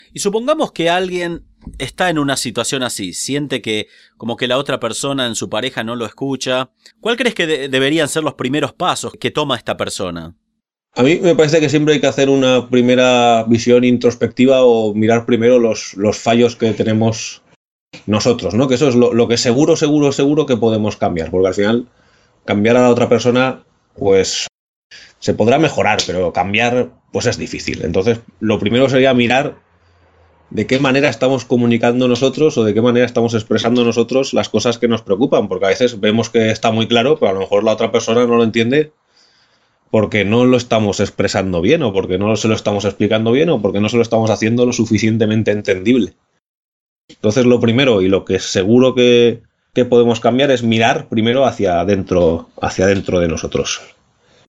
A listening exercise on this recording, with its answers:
Listen to the audio as many times as you need to understand the gist of it. Then click on the tab below and decide whether the statements are True or False. Listen as many times as you need.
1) Es importante mirar los fallos que tenemos nosotros.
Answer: Verdadero

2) El cree que hay que convencer al otro a que acepte sus errores.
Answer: Falso

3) Es importante evaluar cómo nos comunicamos.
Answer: Verdadero

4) Él afirma que hay que imponerles nuestra visión a nuestra pareja.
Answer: Falso

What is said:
Supongamos que alguien está en una situación así, que la otra persona en su pareja no lo escucha. ¿Qué podría hacer esta persona para mejorar la situación?
-A mí me parece que siempre hay que hacer una primera visión introspectiva o mirar primero los fallos que tenemos nosotros que eso es lo que seguro, seguro, seguro, podemos cambiar, porque al final, cambiar a la otra persona es... se podrá mejorar, pero cambiar es difícil. Lo primero sería mirar de qué manera estamos comunicando nosotros, o de qué manera estamos expresando nosotros las cosas que nos preocupan, porque a veces vemos que está muy claro pero a lo mejor la otra persona no lo entiende porque no lo estamos expresando bien o porque no se lo estamos explicando bien o porque no se lo estamos haciendo lo suficientemente entendible. Entonces, lo primero y lo que es seguro que podemos cambiar es mirar hacia adentro de nosotros.

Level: Advanced